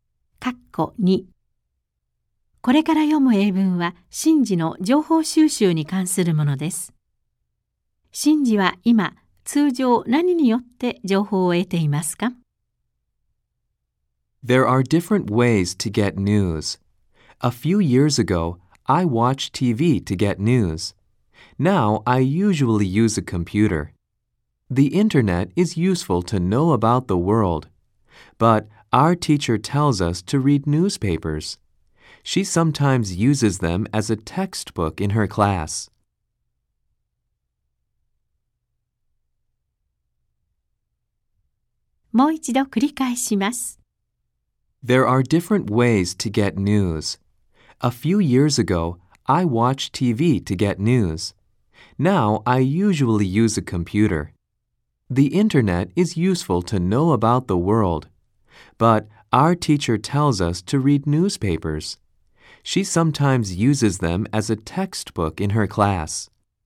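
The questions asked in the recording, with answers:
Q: シンジは今、通常何によって情報を得ていますか?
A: コンピューター(インターネット)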